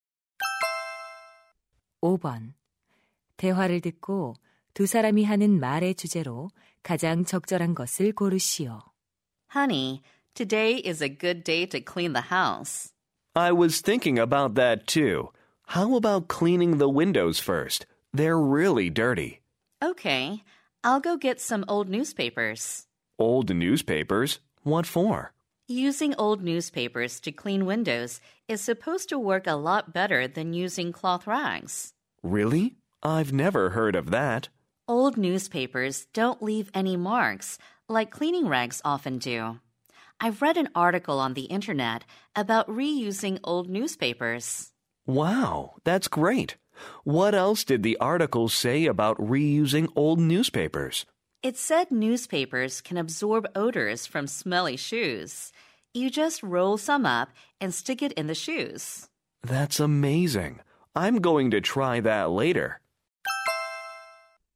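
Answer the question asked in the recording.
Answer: 헌 신문지를 재활용하는 방법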